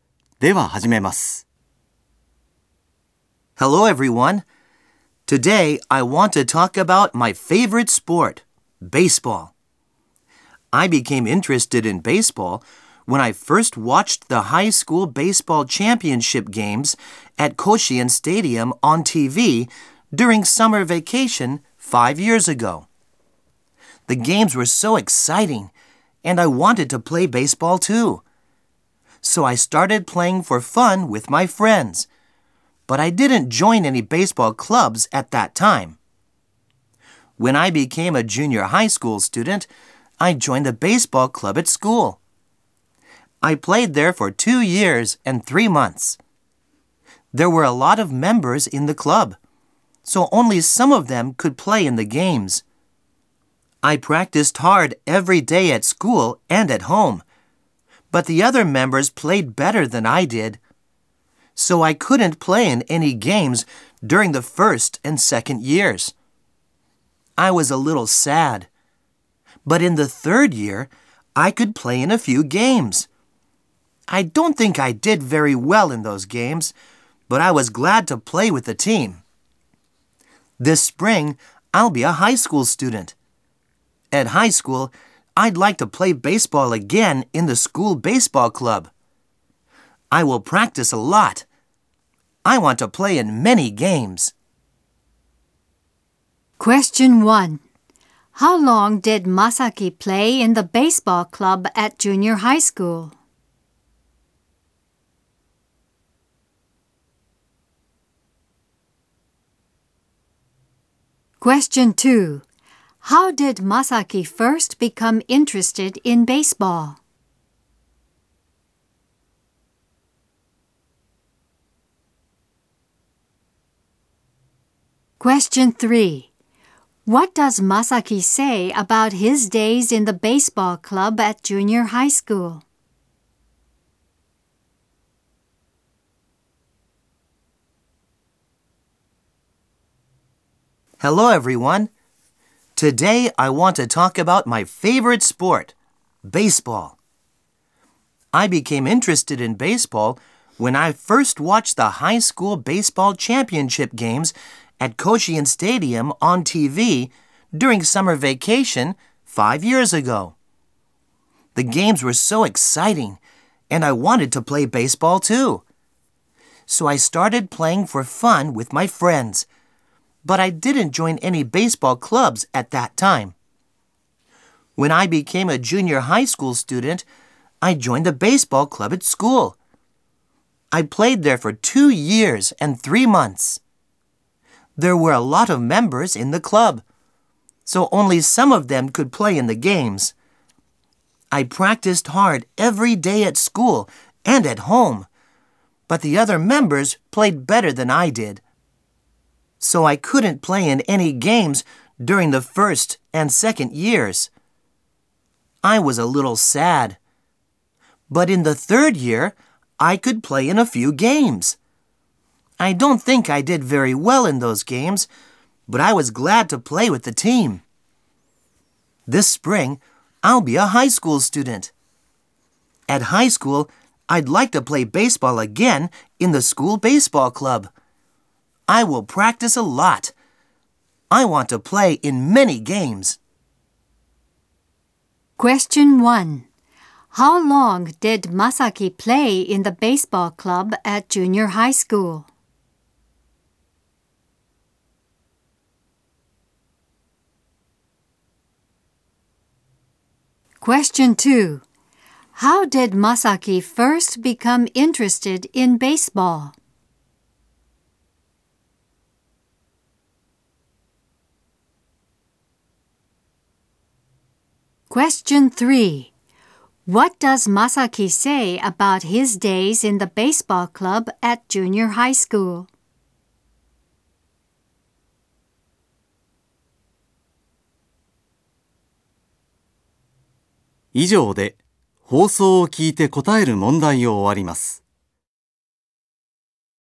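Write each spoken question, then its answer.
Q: How long did Masaki play in the baseball club at junior high school?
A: For 2 years and 3 months

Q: How did Masaki first become interested in baseball?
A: He watched the high school baseball championship games at Koshien Stadium on TV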